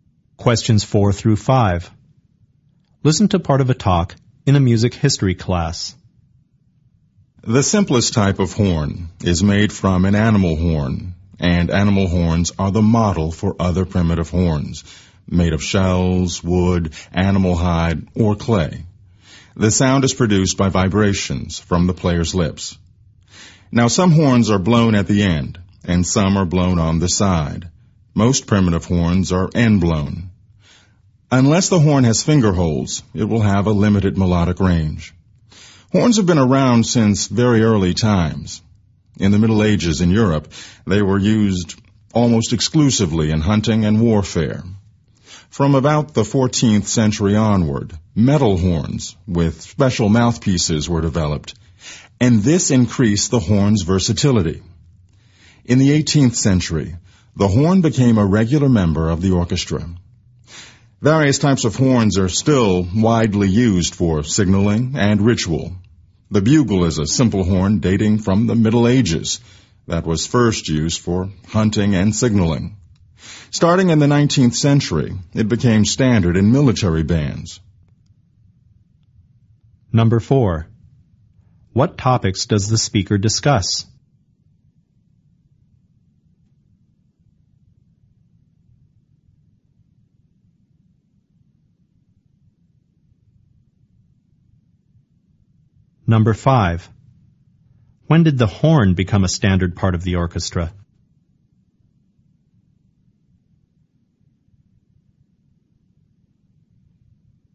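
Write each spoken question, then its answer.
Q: When did the horn become a standard part of the orchestra?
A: In the 18th century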